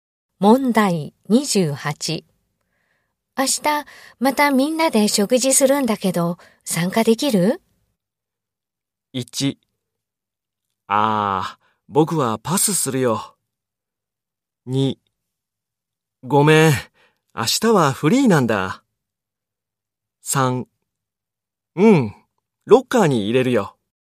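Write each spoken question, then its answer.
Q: 明日、またみんなで食事するんだけど、参加できる?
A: 1: ああ、僕はパスするよ。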